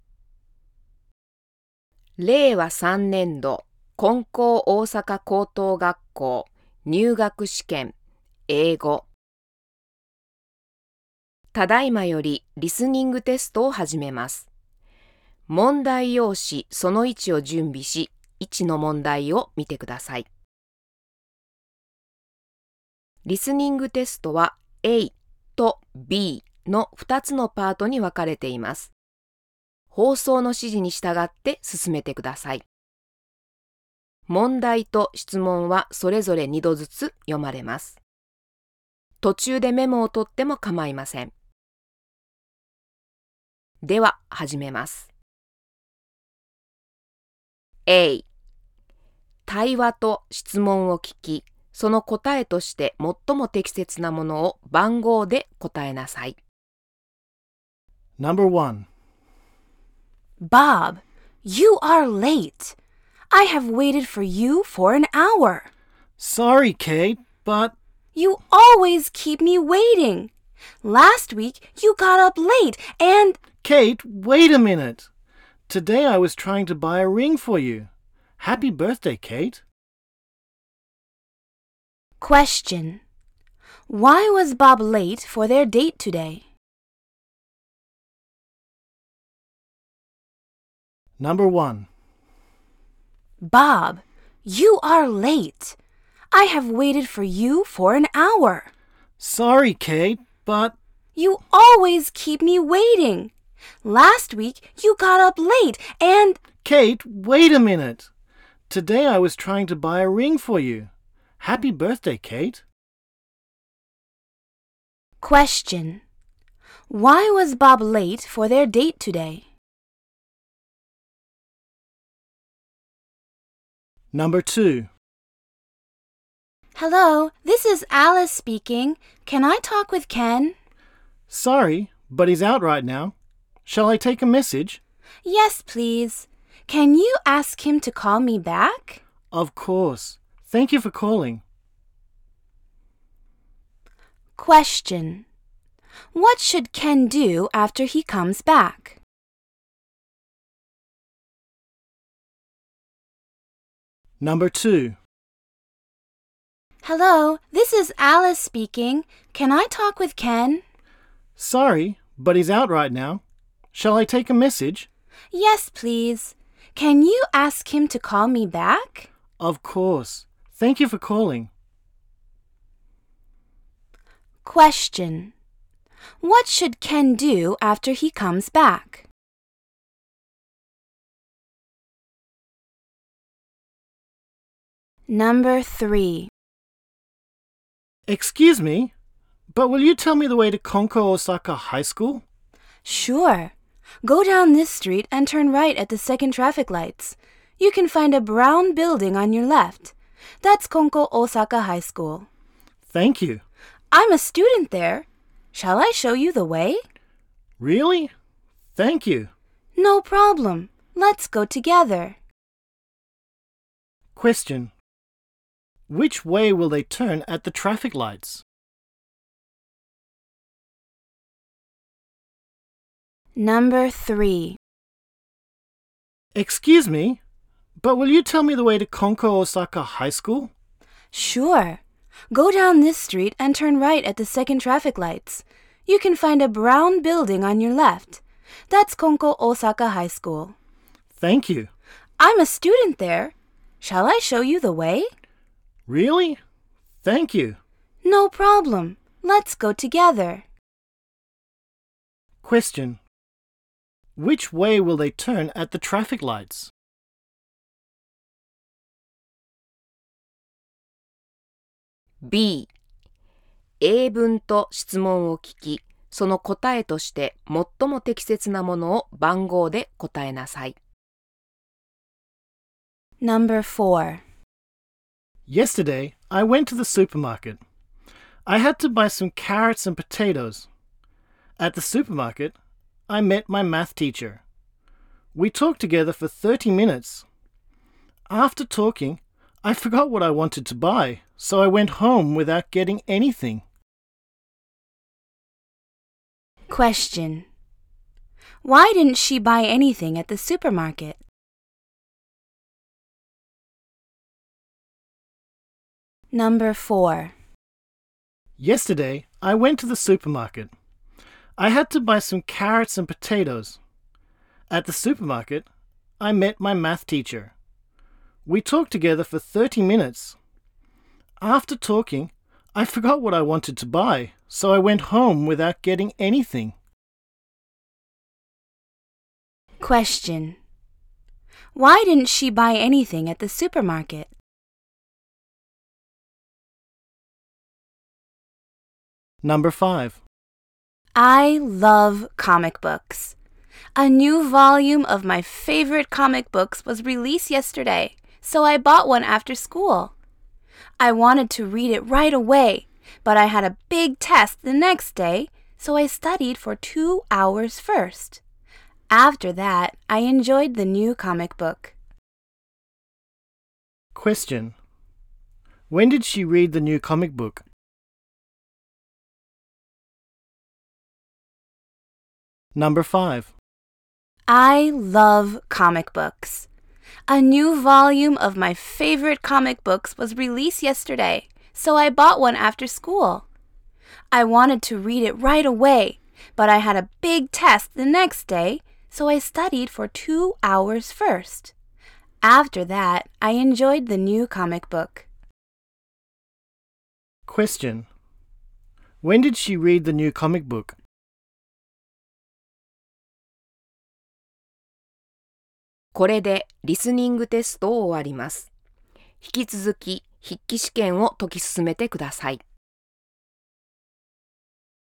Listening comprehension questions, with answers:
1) Why was Bob late for their date today?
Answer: Because he wanted to buy a present for her.

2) What should Ken do after he comes back?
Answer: Call Alice back.

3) Which way will they turn at the traffic lights?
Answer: Turn right.

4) Why didn't she buy anything at the supermarket?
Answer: Because she didn't remember what to buy.

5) When did he read the new comic book?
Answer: After he studied for the test.

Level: 高校